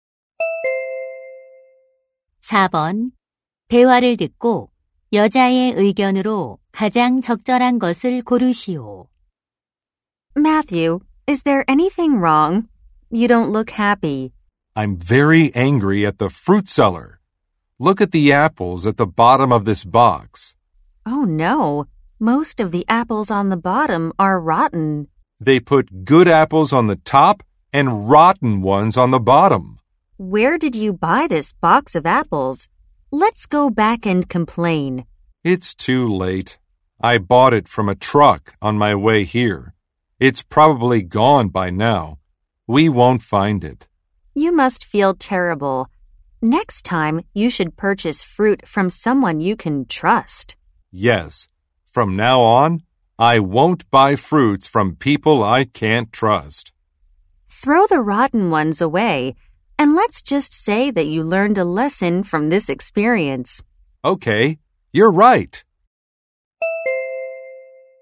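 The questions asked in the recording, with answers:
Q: 대화를 듣고 여자의 의견으로 가장 적절한 것을 고르시오.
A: 과일은 신뢰할 수 있는 사람에게서 사야 한다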